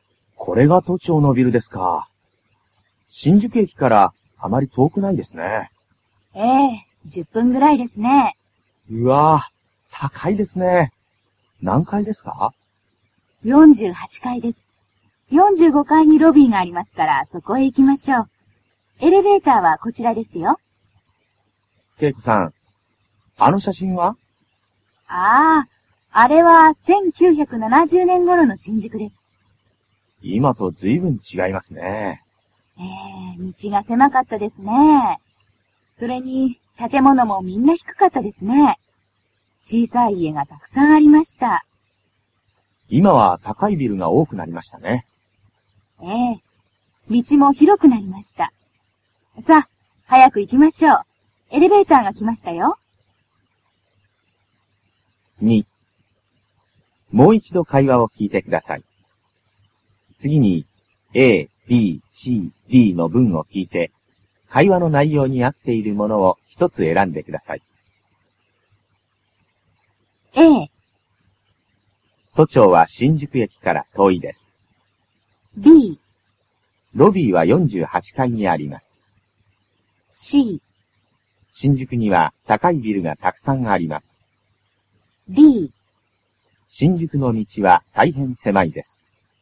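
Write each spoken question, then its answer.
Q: もう一度会話を聞いてください。次に A、B、C、D の文を聞いて、会話の内容に合っているものを一つ選んでください。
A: C: 新宿には高いビルがたくさんあります。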